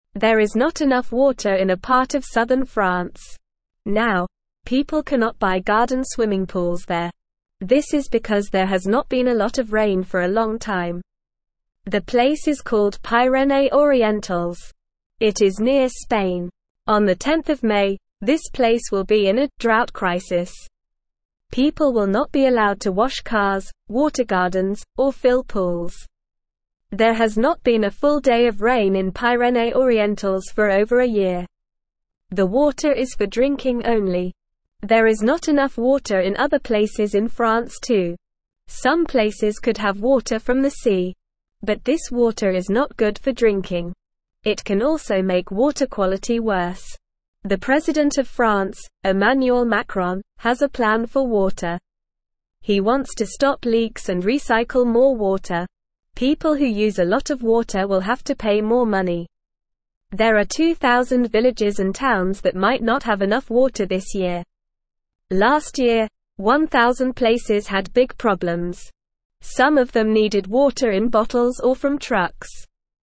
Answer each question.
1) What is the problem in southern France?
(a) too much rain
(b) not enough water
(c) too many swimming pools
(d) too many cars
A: not enough water

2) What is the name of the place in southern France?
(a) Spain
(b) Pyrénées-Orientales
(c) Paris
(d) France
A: Pyrénées-Orientales

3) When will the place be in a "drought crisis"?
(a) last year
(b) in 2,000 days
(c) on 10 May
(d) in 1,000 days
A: on 10 May

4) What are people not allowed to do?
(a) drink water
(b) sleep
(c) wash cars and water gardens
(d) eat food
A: wash cars and water gardens

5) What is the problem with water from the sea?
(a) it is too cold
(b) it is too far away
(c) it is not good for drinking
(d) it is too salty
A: it is not good for drinking

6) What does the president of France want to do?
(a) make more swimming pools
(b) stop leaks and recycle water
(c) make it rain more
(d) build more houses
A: stop leaks and recycle water

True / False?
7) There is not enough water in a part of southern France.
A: True

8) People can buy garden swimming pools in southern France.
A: False

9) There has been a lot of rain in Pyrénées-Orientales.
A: False

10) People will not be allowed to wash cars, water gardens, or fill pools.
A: True

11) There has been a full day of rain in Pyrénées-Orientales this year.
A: False

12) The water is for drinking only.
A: True

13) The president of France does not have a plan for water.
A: False

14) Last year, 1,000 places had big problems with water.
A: True

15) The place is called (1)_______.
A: Pyrénées-Orientales

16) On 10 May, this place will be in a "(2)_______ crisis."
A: drought

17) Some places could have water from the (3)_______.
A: sea

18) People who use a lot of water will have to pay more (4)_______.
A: money

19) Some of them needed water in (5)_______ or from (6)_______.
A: bottles

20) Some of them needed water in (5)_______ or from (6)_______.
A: trucks

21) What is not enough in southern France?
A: There is not enough water in southern France.

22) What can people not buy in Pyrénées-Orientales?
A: People cannot buy garden swimming pools there.

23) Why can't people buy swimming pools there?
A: They can't buy swimming pools because there has not been a lot of rain for a long time.

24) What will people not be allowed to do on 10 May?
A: People will not be allowed to wash cars, water gardens, or fill pools.

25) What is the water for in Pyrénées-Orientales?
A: The water is for drinking only.

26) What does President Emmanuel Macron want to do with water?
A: President Emmanuel Macron wants to stop leaks and recycle more water.

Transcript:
Now, people cannot buy garden swimming pools there. This is because there has not been a lot of rain for a long time. The place is called Pyrénées-Orientales. It is near Spain. On 10 May, this place will be in a "drought crisis." People will not be allowed to wash cars, water gardens, or fill pools.
There has not been a full day of rain in Pyrénées-Orientales for over a year. There is not enough water in other places in France too. Some places could have water from the sea. But this water is not good for drinking. It can also make water quality worse.
The president of France, Emmanuel Macron, has a plan for water. He wants to stop leaks and recycle more water. People who use a lot of water will have to pay more money. There are 2,000 villages and towns that might not have enough water this year. Last year, 1,000 places had big problems. Some of them needed water in bottles or from trucks.

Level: Level 1

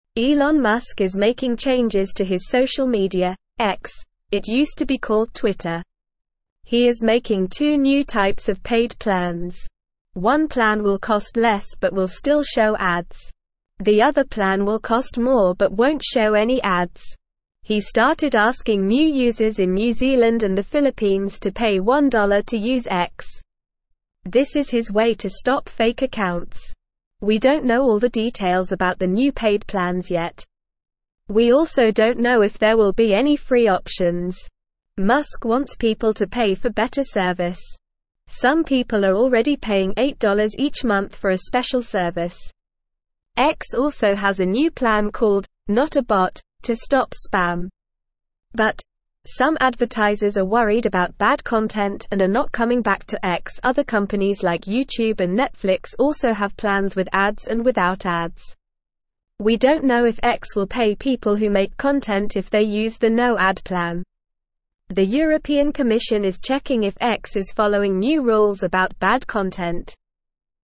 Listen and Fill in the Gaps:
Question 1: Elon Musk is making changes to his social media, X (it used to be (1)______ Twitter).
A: called

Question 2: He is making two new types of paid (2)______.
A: plans

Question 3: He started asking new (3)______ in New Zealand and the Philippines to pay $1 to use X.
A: users

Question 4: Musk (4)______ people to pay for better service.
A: wants

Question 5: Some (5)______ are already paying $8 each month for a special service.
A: people

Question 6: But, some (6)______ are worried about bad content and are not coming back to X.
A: advertisers

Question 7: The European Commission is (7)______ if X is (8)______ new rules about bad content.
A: checking

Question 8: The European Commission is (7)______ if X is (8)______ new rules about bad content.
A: following

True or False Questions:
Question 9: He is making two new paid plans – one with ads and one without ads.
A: True

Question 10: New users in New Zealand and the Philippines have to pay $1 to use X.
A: True

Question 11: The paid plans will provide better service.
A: True

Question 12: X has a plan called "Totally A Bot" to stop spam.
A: False

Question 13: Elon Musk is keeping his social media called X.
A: False

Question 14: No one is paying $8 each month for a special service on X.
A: False

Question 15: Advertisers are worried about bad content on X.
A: True

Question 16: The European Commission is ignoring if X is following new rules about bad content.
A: False

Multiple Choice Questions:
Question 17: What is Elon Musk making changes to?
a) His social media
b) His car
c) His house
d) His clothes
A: His social media

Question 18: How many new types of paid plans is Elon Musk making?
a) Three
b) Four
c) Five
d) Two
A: Two

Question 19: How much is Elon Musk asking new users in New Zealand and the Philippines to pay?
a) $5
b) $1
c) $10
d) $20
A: $1

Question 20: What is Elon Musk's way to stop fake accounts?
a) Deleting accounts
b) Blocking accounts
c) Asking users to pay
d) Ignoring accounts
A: Asking users to pay

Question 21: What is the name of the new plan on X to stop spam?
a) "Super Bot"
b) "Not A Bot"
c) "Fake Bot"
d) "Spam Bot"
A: "Not A Bot"

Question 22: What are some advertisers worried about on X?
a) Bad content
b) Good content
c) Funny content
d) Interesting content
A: Bad content

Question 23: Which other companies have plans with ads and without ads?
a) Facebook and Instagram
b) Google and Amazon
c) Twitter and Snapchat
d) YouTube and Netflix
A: YouTube and Netflix

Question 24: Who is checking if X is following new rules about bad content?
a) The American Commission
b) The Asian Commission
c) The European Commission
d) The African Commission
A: The European Commission

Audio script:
Elon Musk is making changes to his social media, X (it used to be called Twitter). He is making two new types of paid plans. One plan will cost less but will still show ads. The other plan will cost more but won't show any ads. He started asking new users in New Zealand and the Philippines to pay $1 to use X. This is his way to stop fake accounts.
We don't know all the details about the new paid plans yet. We also don't know if there will be any free options. Musk wants people to pay for better service. Some people are already paying $8 each month for a special service. X also has a new plan called "Not A Bot" to stop spam. But, some advertisers are worried about bad content and are not coming back to X. Other companies like YouTube and Netflix also have plans with ads and without ads. We don't know if X will pay people who make content if they use the no-ad plan. The European Commission is checking if X is following new rules about bad content.

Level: Level 1

